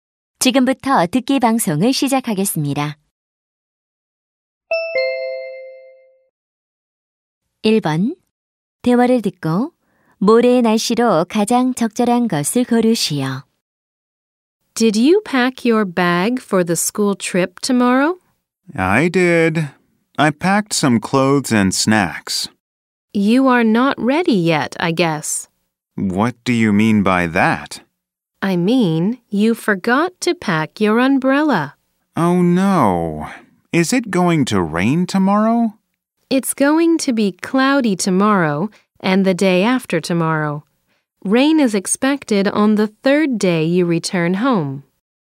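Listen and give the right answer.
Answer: 흐림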